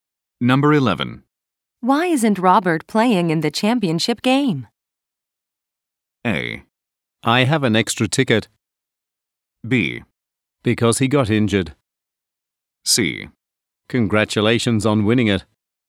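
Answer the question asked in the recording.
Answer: B: Because he got injured.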